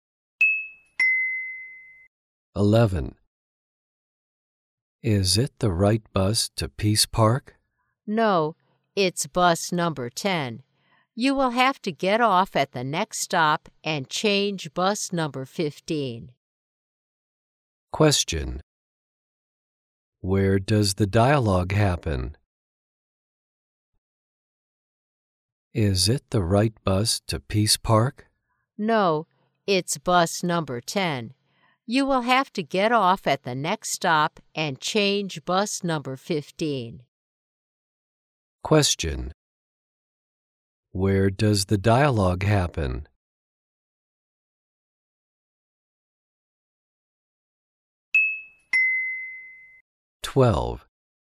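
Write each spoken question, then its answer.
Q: Question. Where does the dialogue happen?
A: On a bus.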